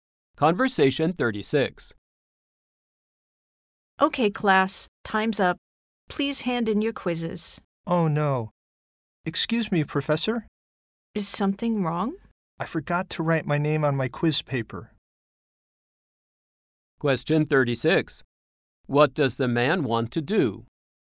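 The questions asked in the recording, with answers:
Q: What does the man want to do?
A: Write his name on his quiz paper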